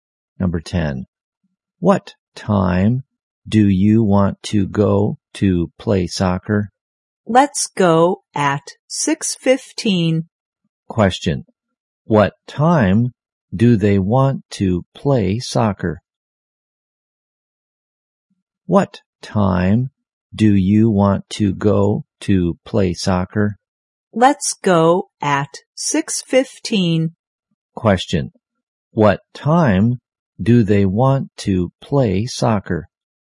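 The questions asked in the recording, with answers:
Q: What time do they want to play soccer?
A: At 6:15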